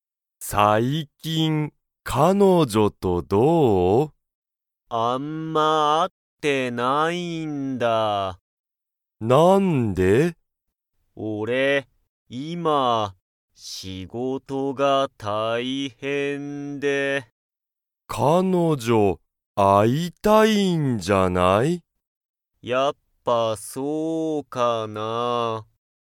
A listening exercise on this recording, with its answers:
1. しんじは、彼女(かのじょ)とよく会(あ)っていますか?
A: いいえ

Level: Level 1